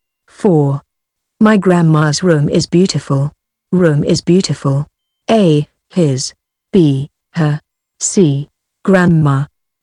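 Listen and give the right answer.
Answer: B: her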